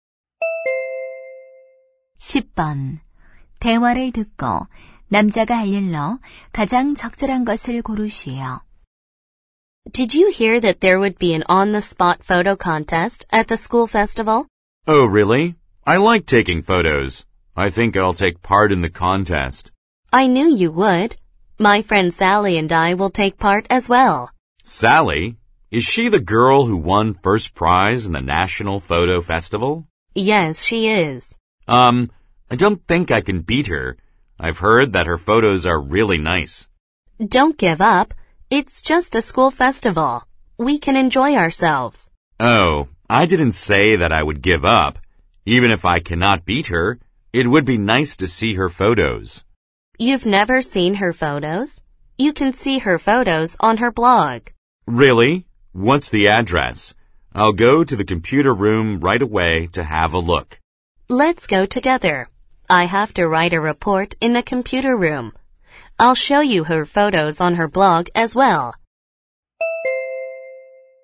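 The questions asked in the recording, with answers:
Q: 대화를 듣고 남자가 할 일로 가장 적절한 것을 고르시오.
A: 컴퓨터실에 가서 Sally의 블로그 사진 보기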